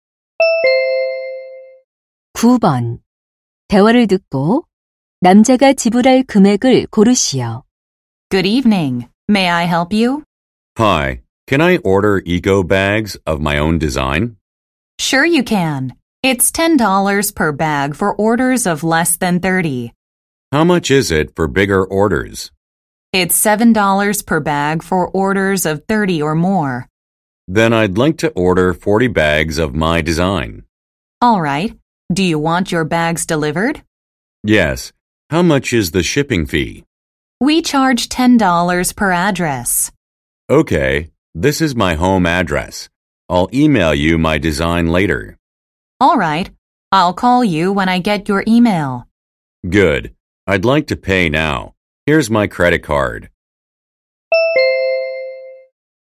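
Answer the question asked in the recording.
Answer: 290달러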